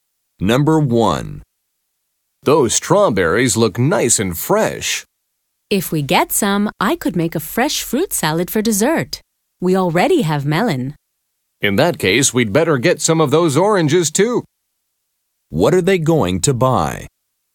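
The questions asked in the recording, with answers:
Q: What are they going to buy?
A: Strawberries and oranges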